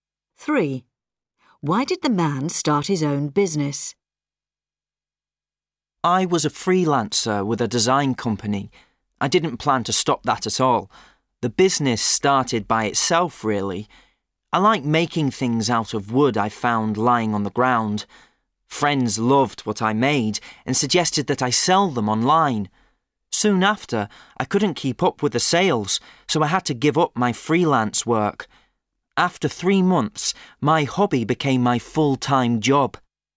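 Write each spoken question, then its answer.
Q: Why did the man start his own business?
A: His hobby of making wooden things sold so well online that it became his full-time job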